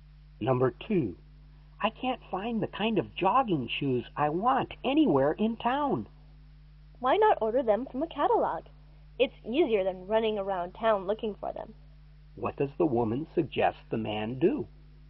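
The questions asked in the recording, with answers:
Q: What does the woman suggest the man do?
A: Order the shoes from a catalog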